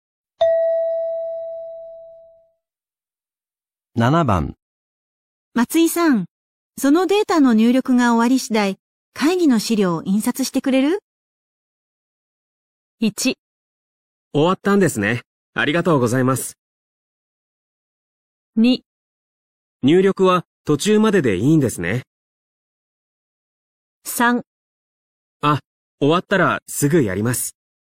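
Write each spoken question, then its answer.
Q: 松井さん、そのデータの入力が終わり次第、会議の資料を印刷してくれる?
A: 3: あ、終わったらすぐやります。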